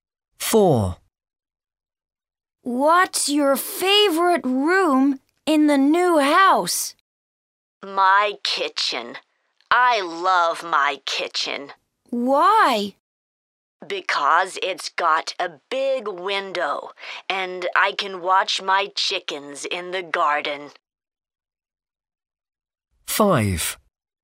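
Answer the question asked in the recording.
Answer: the kitchen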